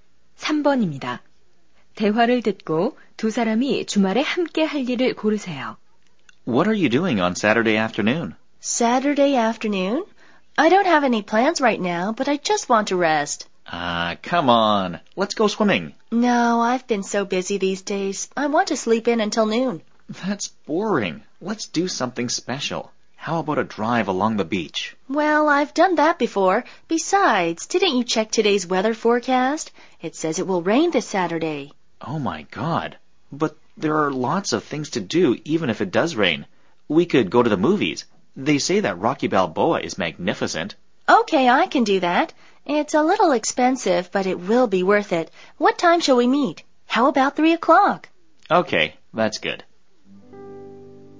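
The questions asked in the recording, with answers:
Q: 대화를 듣고 두 사람이 주말에 함께 할 일을 고르세요.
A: 영화 보러 가기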